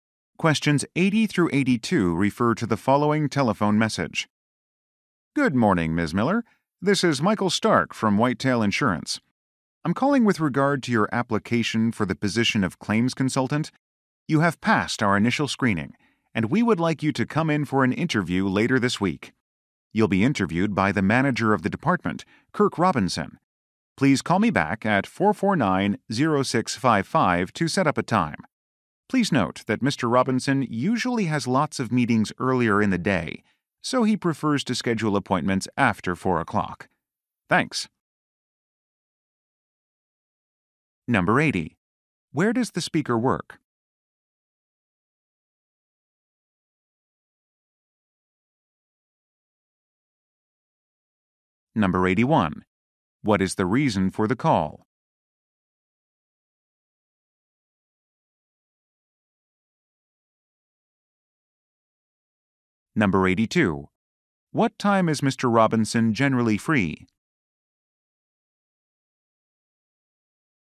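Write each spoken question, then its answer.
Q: Where does the speaker work?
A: At an insurance company

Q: What is the reason for the call?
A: To invite the listener to a job interview

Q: What time is Mr. Robinson generally free?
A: After 4 o'clock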